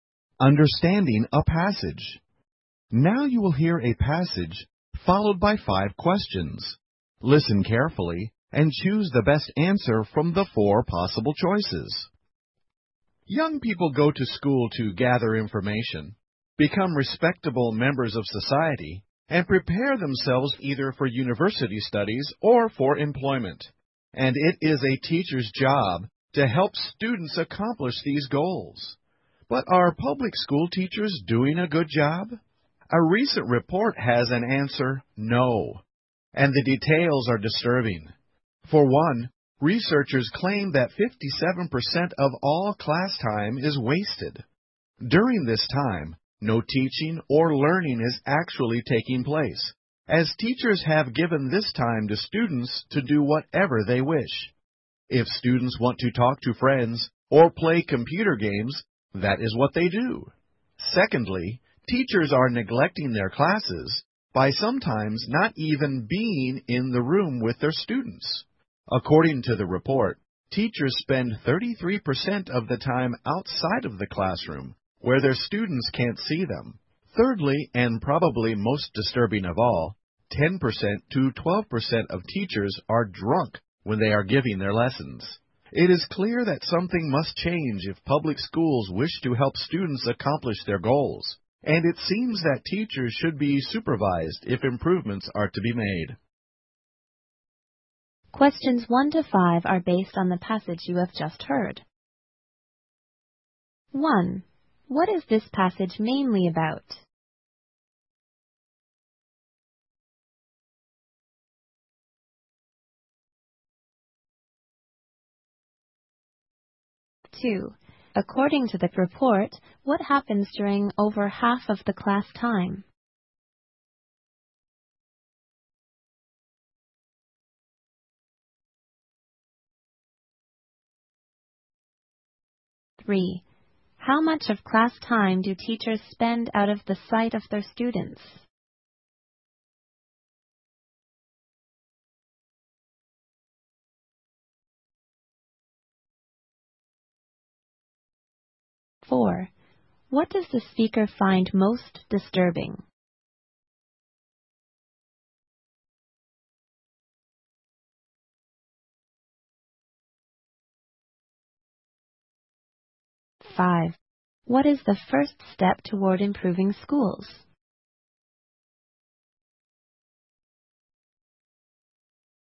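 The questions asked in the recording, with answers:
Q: What is this passage mainly about?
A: Public school teachers are not doing a good job.

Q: According to the report, what happens during over half of the class time?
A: No teaching or learning takes place; students do whatever they wish.

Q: How much of class time do teachers spend out of the sight of their students?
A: 33%

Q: What does the speaker find most disturbing?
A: 10% to 12% of teachers are drunk while teaching.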